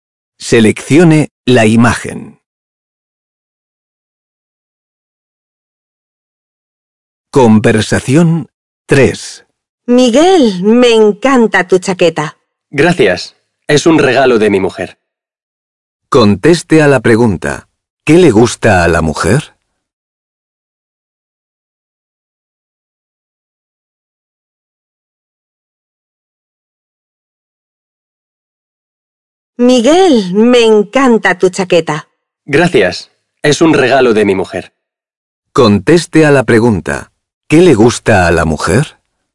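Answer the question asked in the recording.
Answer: La chaqueta de Miguel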